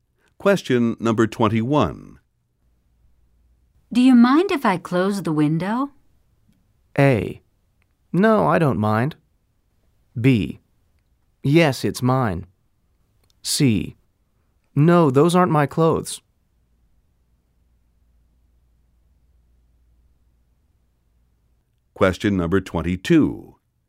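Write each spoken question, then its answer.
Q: Do you mind if I close the window?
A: A: No, I don't mind.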